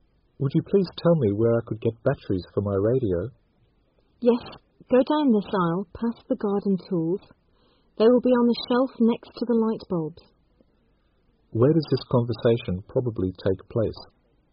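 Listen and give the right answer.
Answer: In a store (hardware/department store)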